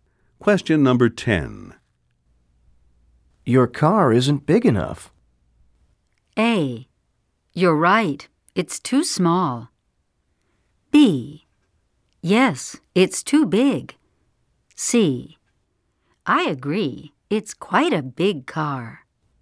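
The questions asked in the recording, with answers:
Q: Your car isn't big enough.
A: A: You're right. It's too small.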